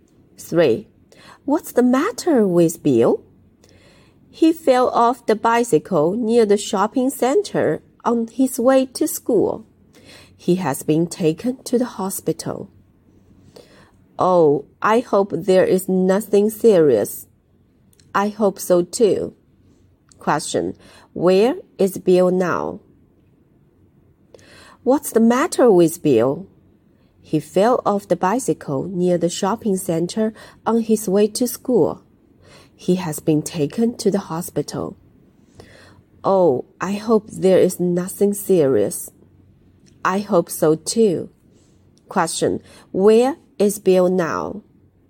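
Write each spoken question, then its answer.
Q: Where is Bill now?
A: In the hospital.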